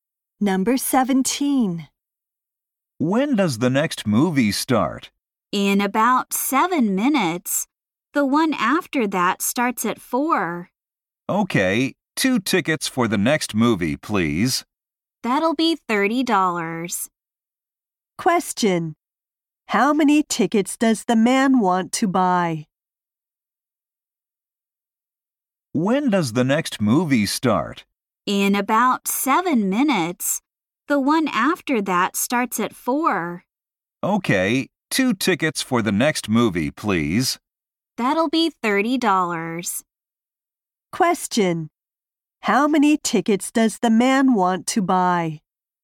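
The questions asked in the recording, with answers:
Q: How many tickets does the man want to buy?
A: Two.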